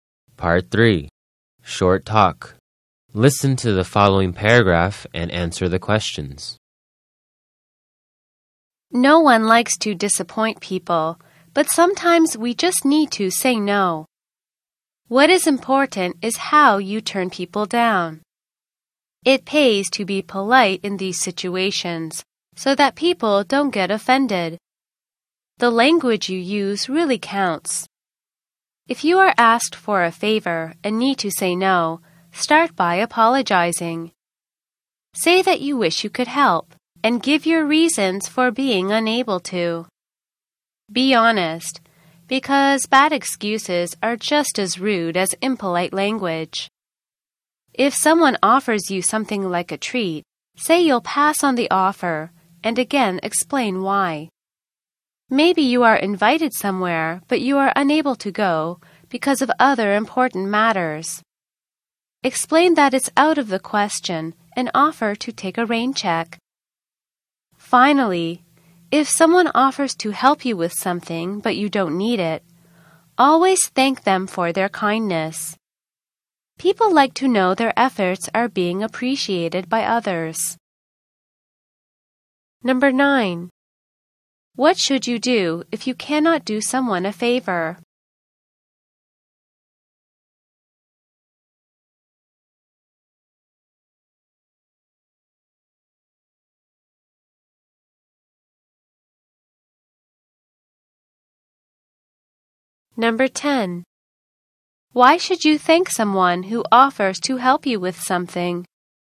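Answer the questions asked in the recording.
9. Apologize and honestly give your reasons
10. People like to know their efforts are appreciated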